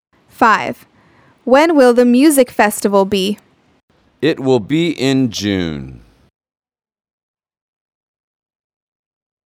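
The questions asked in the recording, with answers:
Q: When will the music festival be?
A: In June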